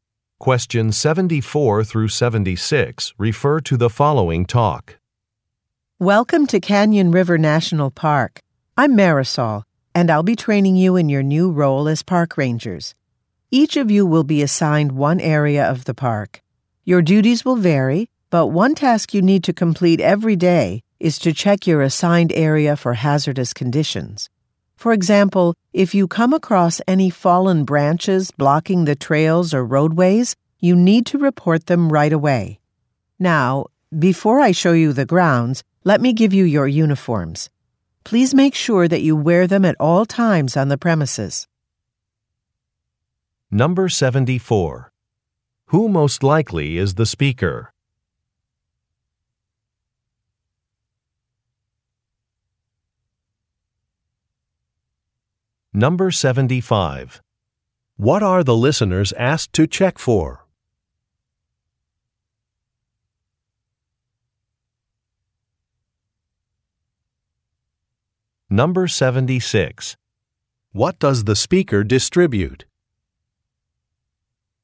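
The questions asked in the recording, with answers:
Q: Who most likely is the speaker?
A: A park ranger trainer

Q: What are the listeners asked to check for?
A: Hazardous conditions

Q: What does the speaker distribute?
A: Uniforms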